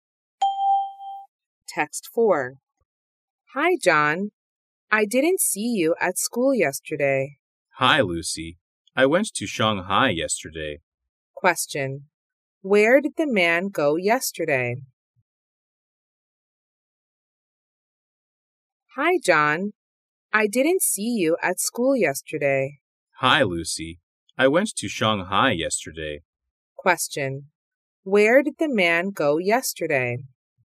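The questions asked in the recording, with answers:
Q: Where did the man go yesterday?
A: Shanghai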